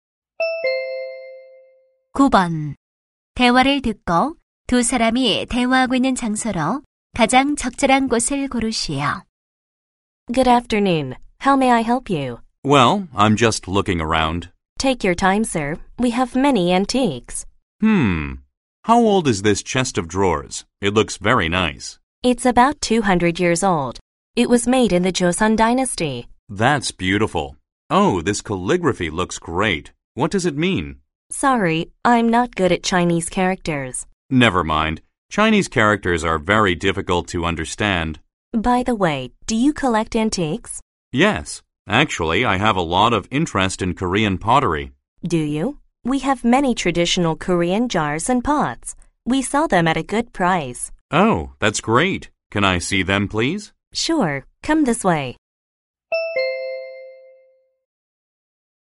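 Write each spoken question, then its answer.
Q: 대화를 듣고 두 사람이 대화하고 있는 장소로 가장 적절한 곳을 고르시오.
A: 골동품 가게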